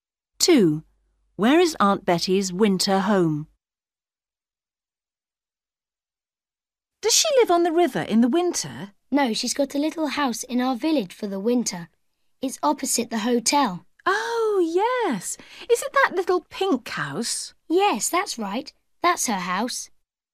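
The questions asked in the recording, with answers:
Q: Where is Aunt Betty's winter home?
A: A little pink house opposite the hotel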